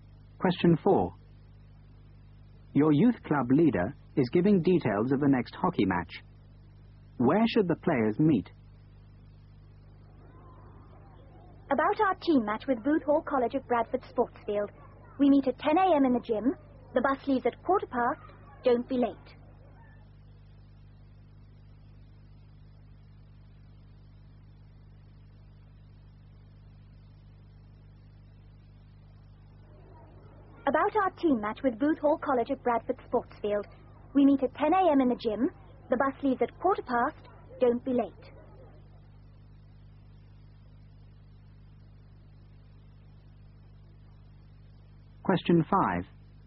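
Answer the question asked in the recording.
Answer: In the gym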